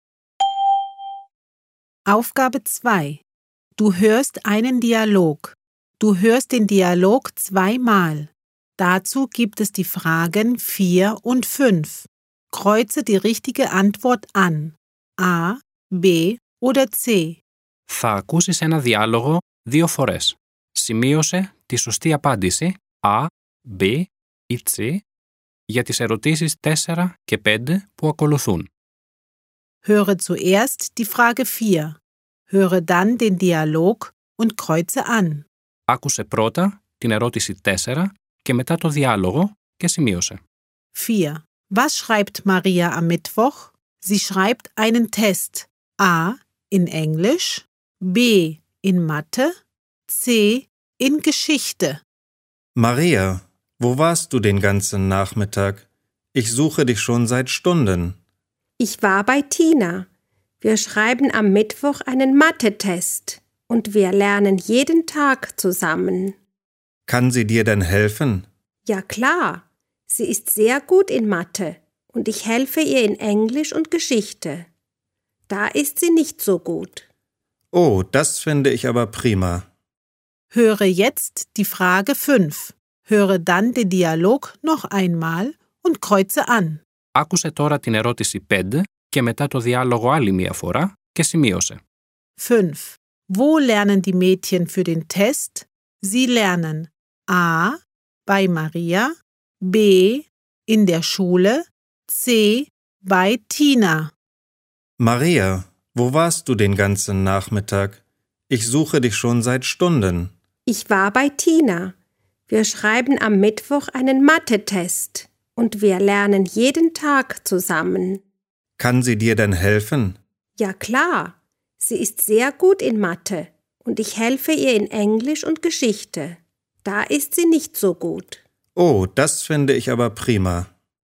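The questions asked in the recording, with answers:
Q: Was schreibt Maria am Mittwoch?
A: B: In Mathe

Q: Wo lernen die Mädchen für den Test?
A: C: Bei Tina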